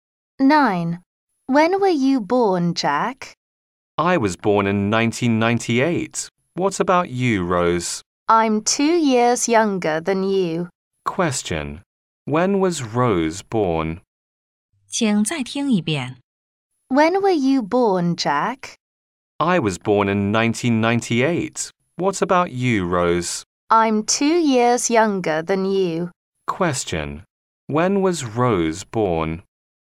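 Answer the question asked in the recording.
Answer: In 2000.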